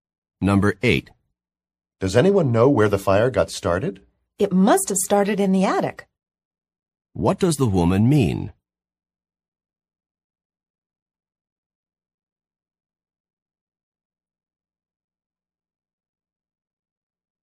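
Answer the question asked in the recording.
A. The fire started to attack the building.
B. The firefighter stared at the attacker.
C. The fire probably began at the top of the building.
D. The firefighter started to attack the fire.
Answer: C. The fire probably began at the top of the building.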